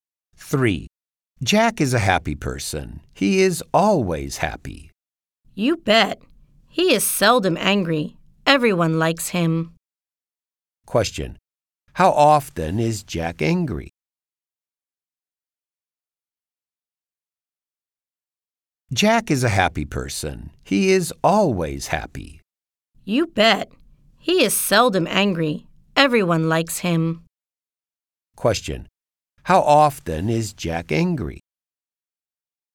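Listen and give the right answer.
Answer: Seldom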